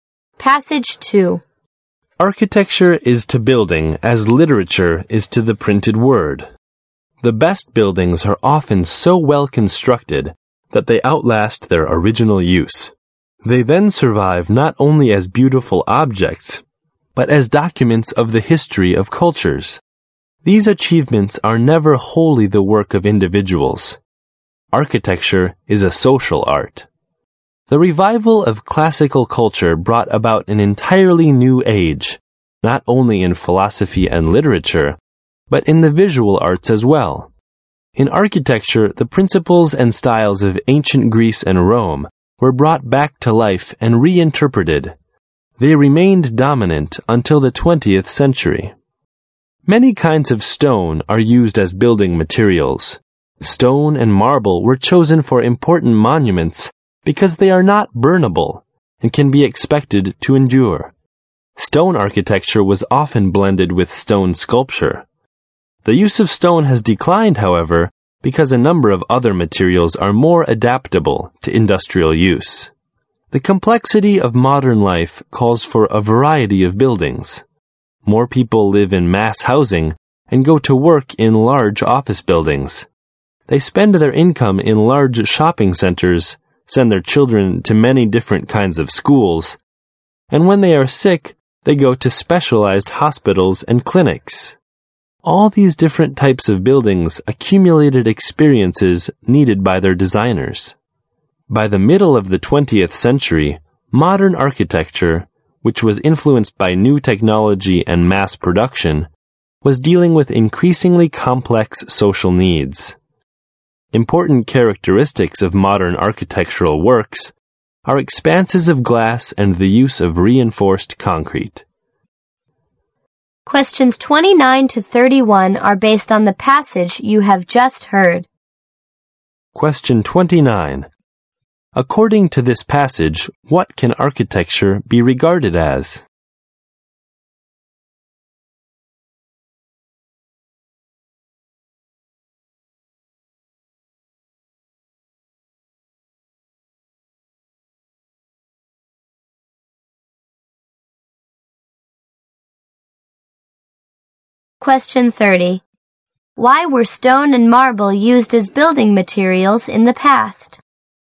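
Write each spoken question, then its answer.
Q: Why were stone and marble used as building materials in the past?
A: They don't burn and are durable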